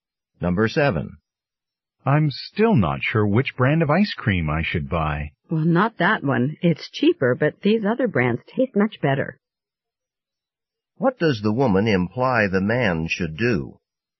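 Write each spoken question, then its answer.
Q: What does the woman imply the man should do?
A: Buy one of the more expensive brands that taste better.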